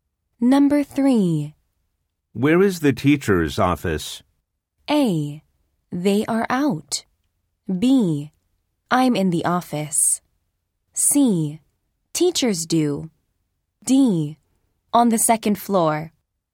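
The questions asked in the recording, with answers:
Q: Where is the teacher's office?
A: D: On the second floor.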